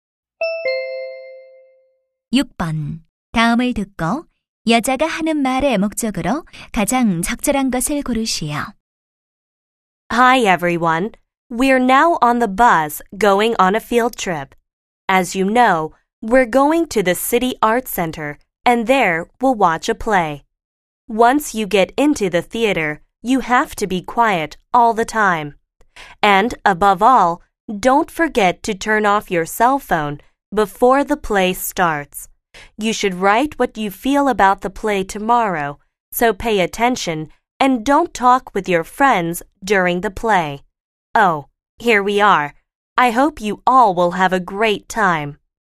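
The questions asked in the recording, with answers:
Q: 다음을 듣고 여자가 하는 말의 목적으로 가장 적절한 것을 고르시오.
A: 공연 관람 시 주의 사항 안내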